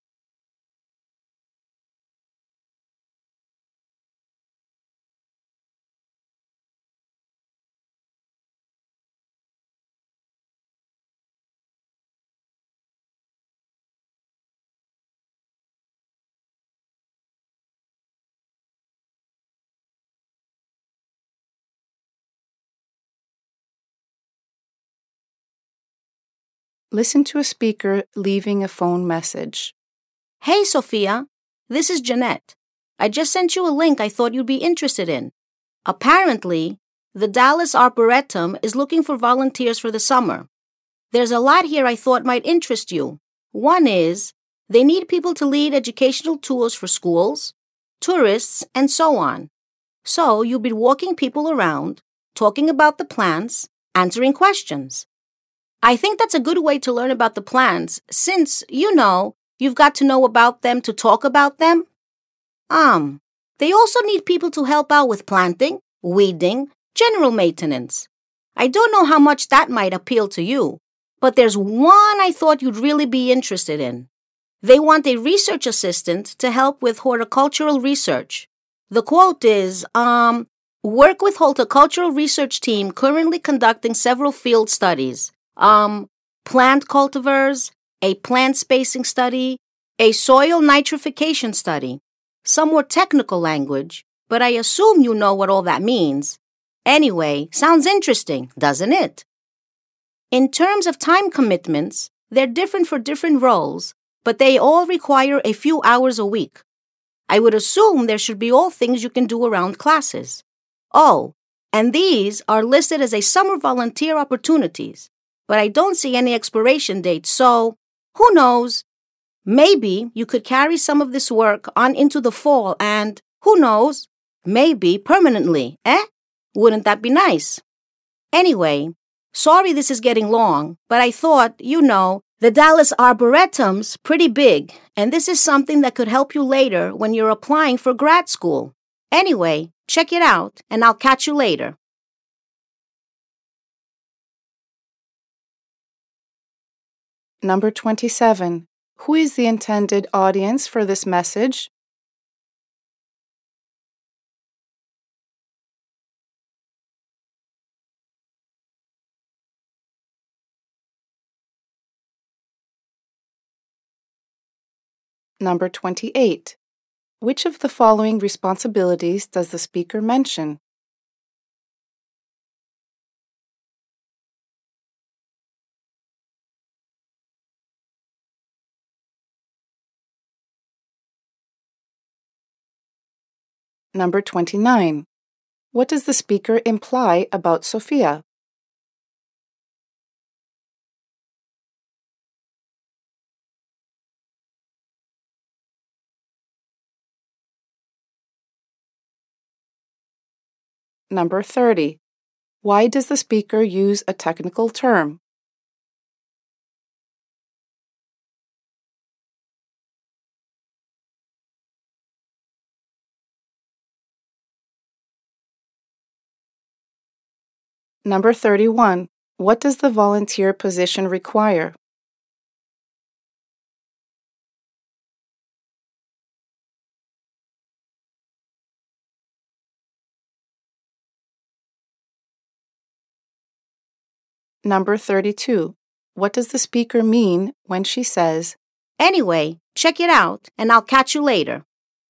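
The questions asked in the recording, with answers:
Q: What does the volunteer position require?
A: A few hours a week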